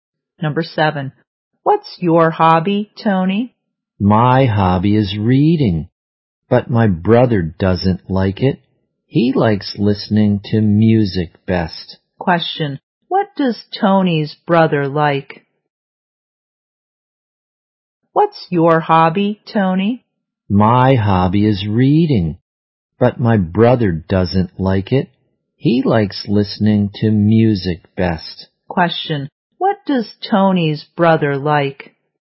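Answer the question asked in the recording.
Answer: Listening to music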